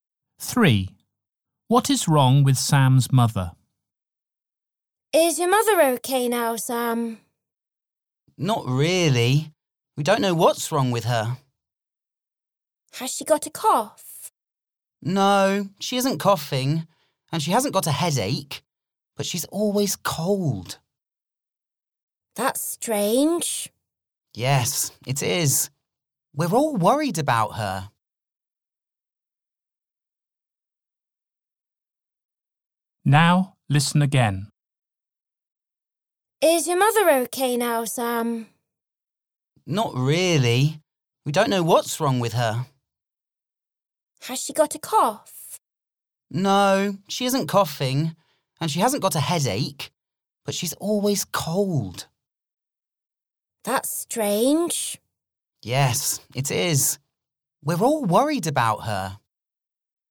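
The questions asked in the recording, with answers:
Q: What is wrong with Sam's mother?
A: She is always cold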